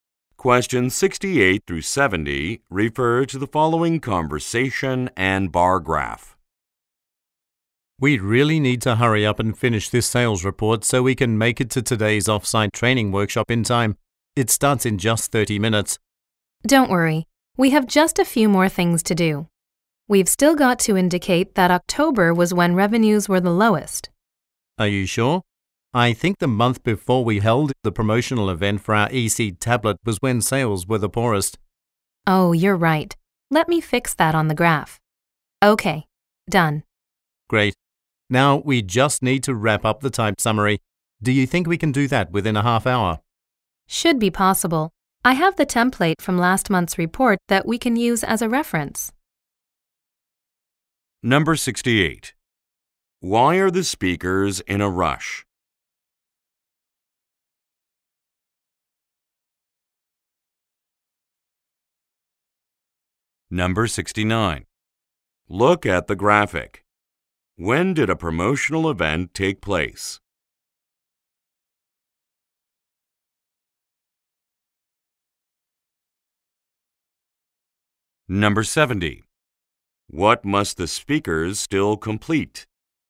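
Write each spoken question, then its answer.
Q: Why are the speakers in a rush?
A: To get to a training workshop on time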